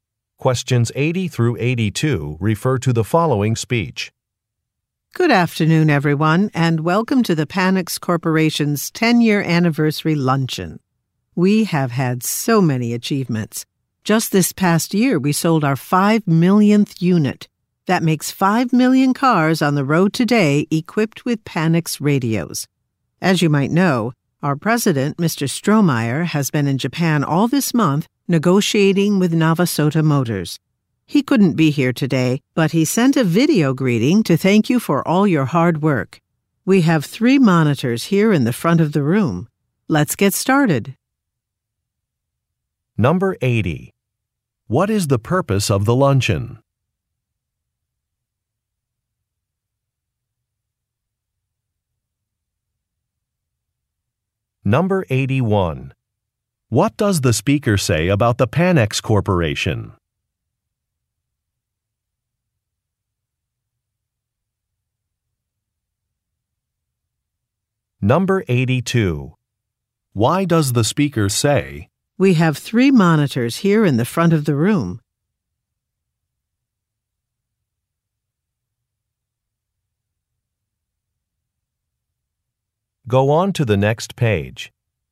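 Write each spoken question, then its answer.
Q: What is the purpose of the luncheon?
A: To celebrate the company's 10-year anniversary

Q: What does the speaker say about the Panex Corporation?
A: It has sold 5 million car radios

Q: Why does the speaker say,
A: The president's video greeting will be shown on them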